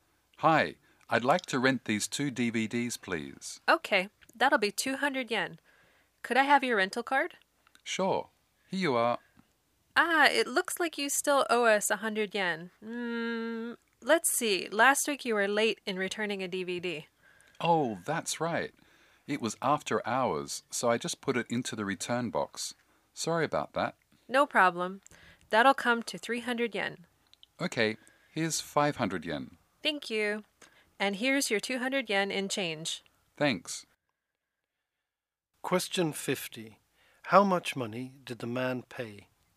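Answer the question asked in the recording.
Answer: 300 yen (he handed over 500 yen and got 200 yen change)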